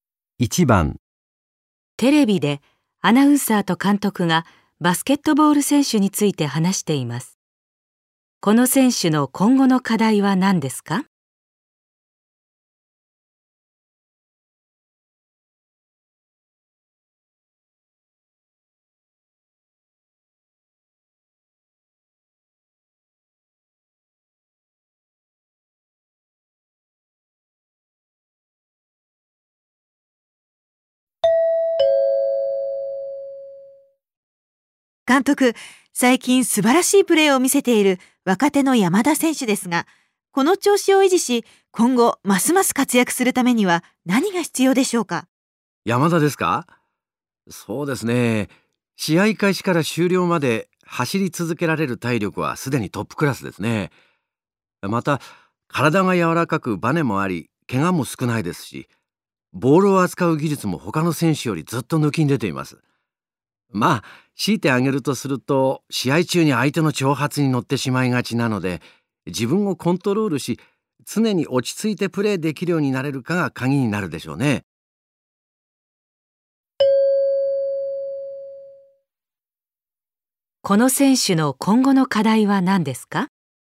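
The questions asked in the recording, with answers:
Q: この選手の今後の課題は何ですか?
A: 試合中に自分をコントロールし、常に落ち着いてプレーできるようになること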